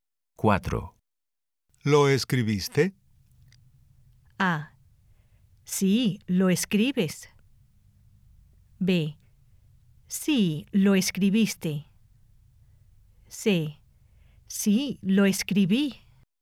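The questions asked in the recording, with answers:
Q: ¿Lo escribiste?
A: C: Sí, lo escribí.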